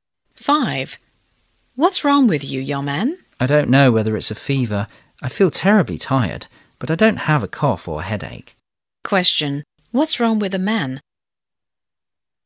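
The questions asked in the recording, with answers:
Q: Question. What's wrong with the man?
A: He feels terribly tired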